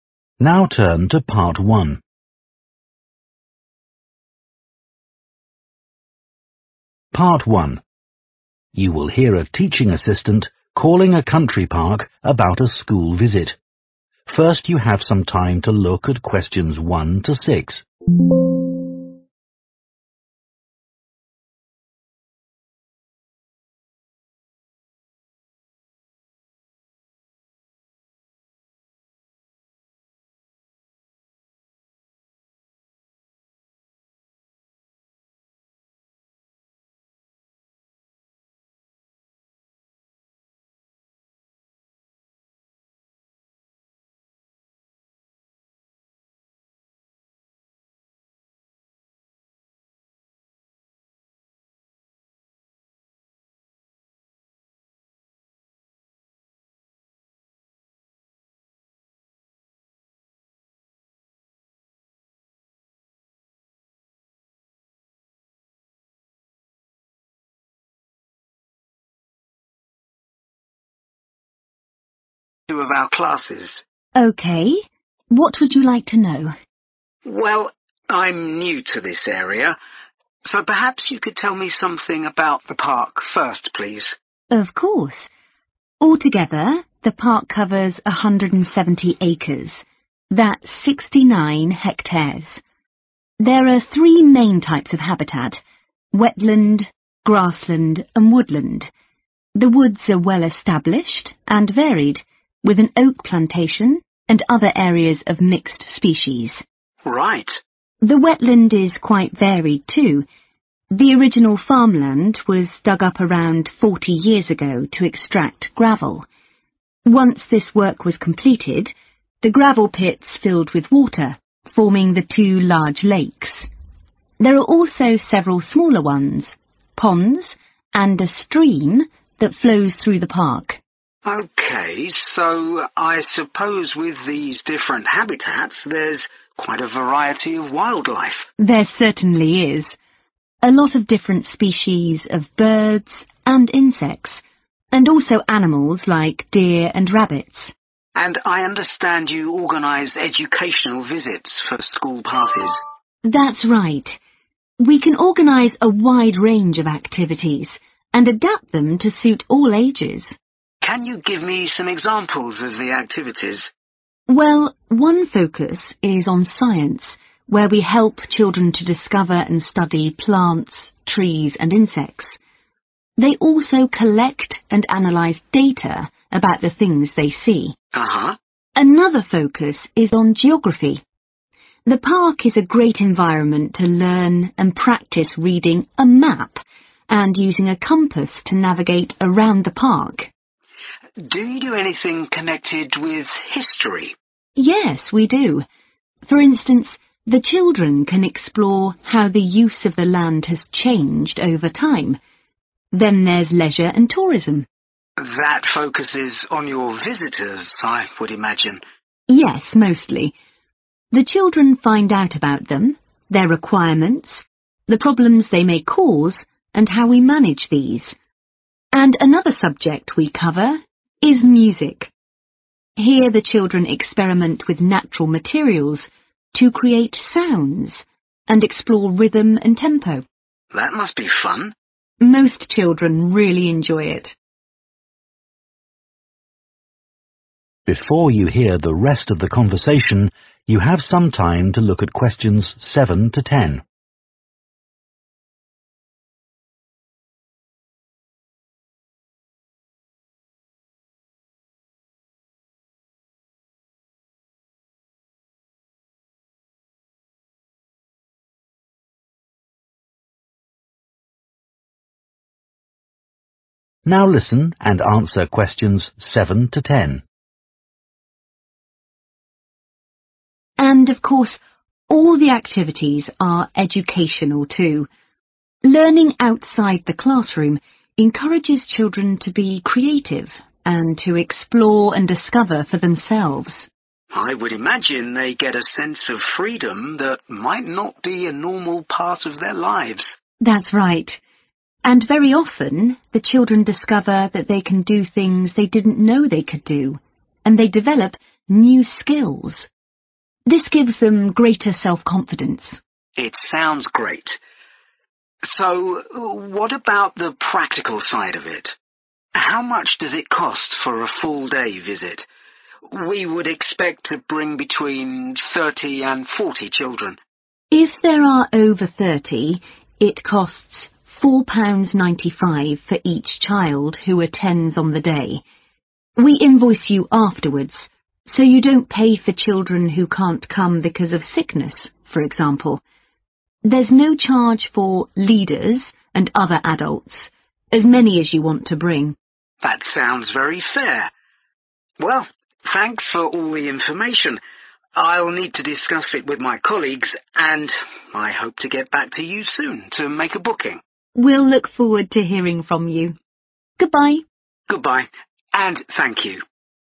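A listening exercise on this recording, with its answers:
Complete the notes Below Write ONE WORD AND/OR A NUMBER for each answer.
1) Area: 1 hectares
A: 69

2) Wetland: lakes, ponds and a 2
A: stream

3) Science: Children look at 3 about plants, etc.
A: data

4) Geography: Includes learning to use a 4 and compass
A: map

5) Leisure and tourism: Mostly concentrates on the park's 5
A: visitors

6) Music: Chlidren make 6 with natural materials, and experiment with rhythm and speed.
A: sounds

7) They give children a feeling of 7 that they may not have elsewhere.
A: freedom

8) Children learn new 8 and gain self-confidence.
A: skills

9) Cost per child: 9 £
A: 4.95

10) Adults, Such as 10 , free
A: leaders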